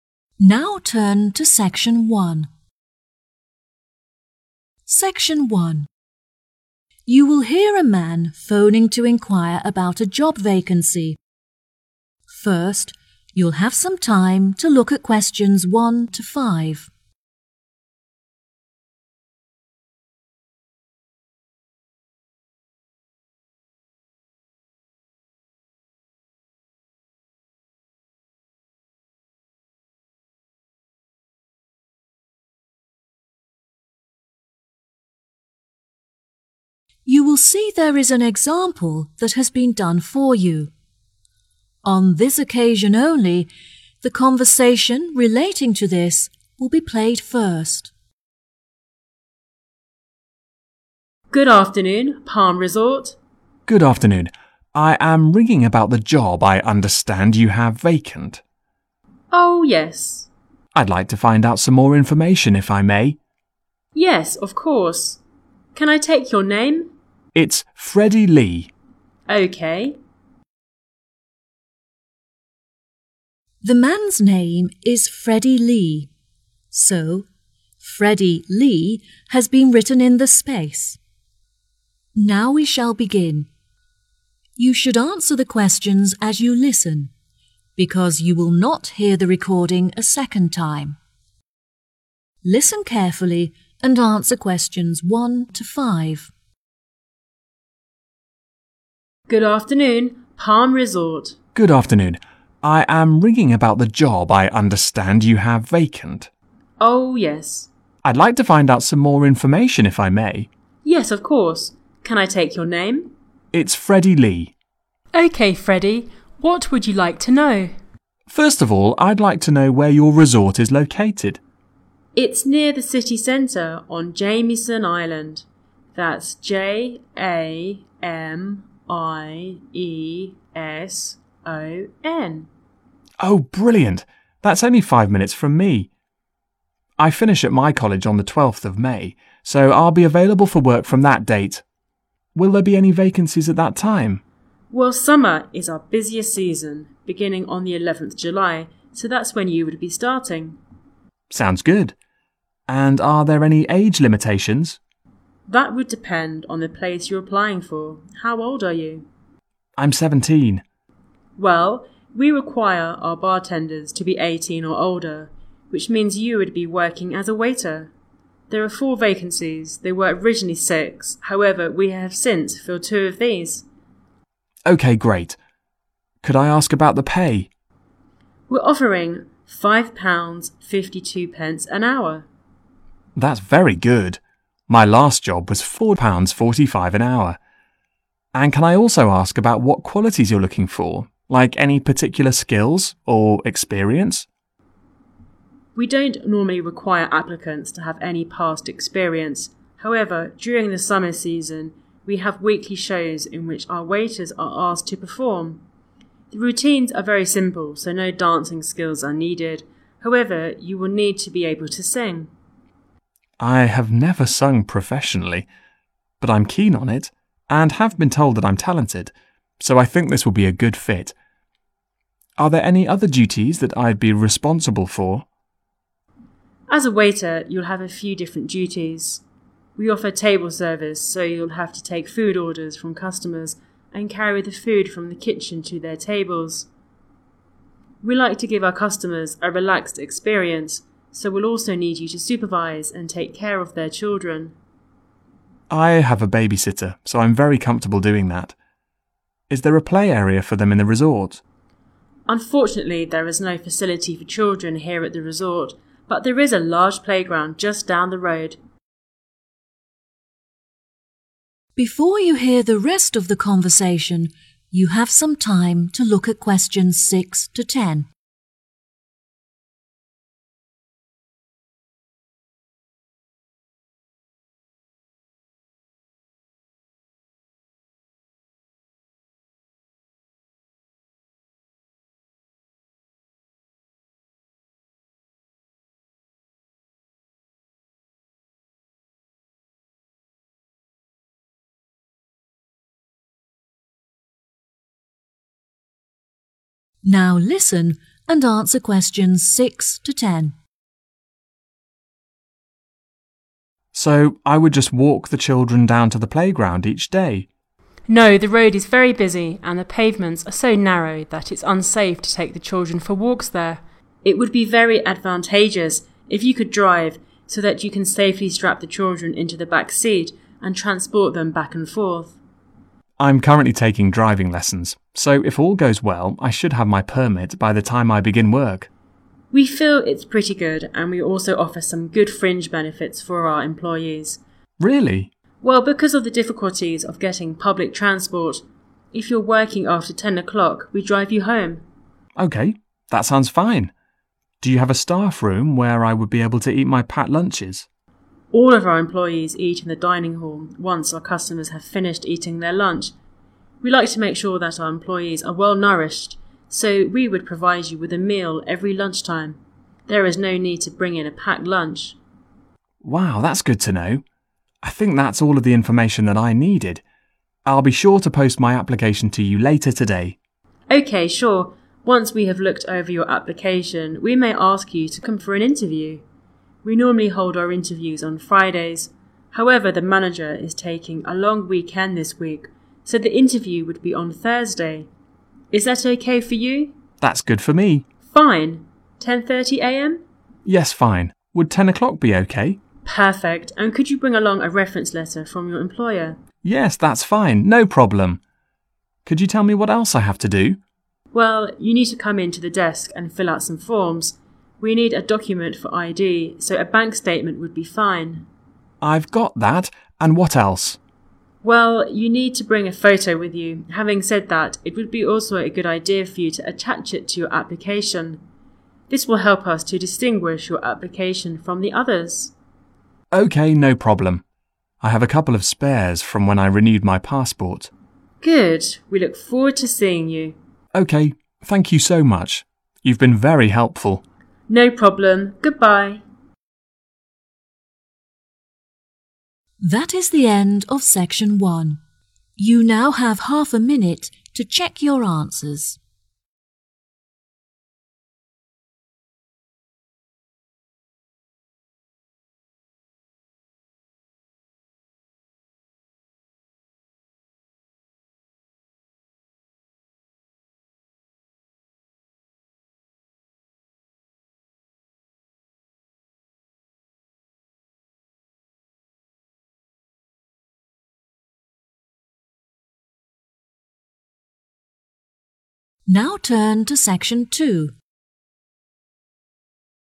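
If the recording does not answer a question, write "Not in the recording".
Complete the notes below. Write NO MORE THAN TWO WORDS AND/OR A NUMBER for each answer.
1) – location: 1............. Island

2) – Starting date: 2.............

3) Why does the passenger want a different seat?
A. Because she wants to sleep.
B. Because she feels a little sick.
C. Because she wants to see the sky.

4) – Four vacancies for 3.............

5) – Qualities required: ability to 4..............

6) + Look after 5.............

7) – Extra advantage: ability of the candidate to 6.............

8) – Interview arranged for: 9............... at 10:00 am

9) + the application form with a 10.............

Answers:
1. Jamieson
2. 11th July
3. Not in the recording
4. waiters
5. sing
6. children
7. drive
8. Thursday
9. photo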